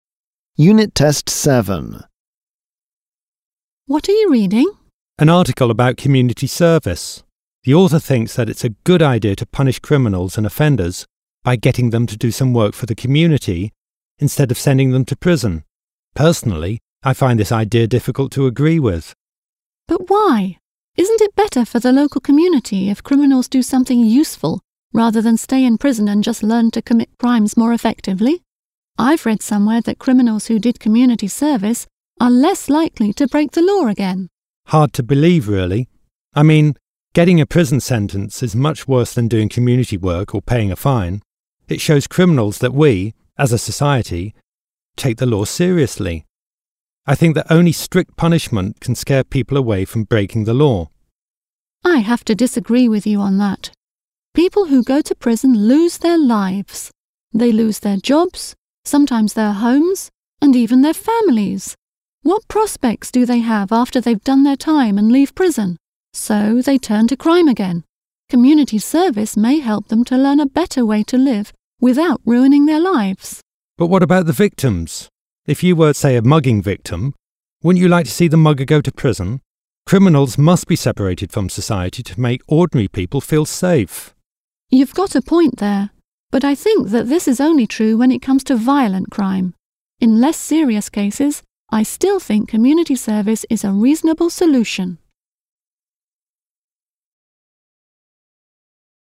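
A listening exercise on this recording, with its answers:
You will hear twice a conversation about community service as a punishment for criminals . Tick the sentences which are true (T) or false (F) according to what you hear.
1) The man's opinion is different from that of the article author.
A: True

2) The woman suggests that prison sentences may help reduce crime.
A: false

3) The man believes that only strict punishment is effective.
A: true

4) The woman says that criminals may have no future after leaving prison.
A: true

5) The woman thinks that community service is suitable for all criminals.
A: false

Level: 10 Клас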